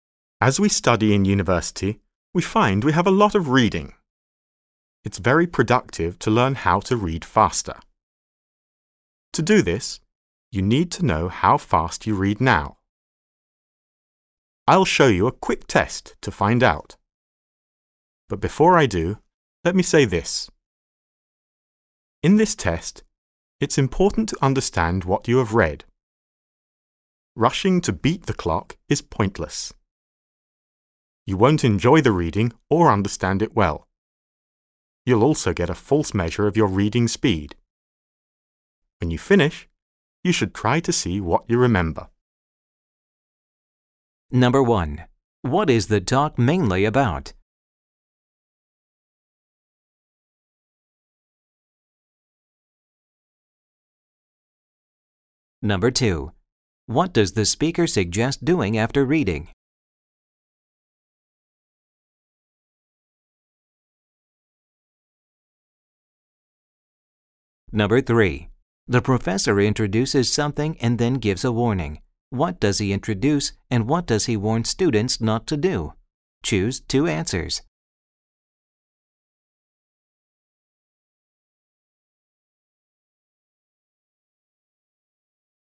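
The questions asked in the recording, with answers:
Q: What is the talk mainly about?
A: Measuring your reading speed so you can learn to read faster

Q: What does the speaker suggest doing after reading?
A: Try to see what you remember

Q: The professor introduces something and then gives a warning. What does he introduce and what does he warn students not to do? Choose two answers.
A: He introduces a quick reading speed test; he warns them not to rush to beat the clock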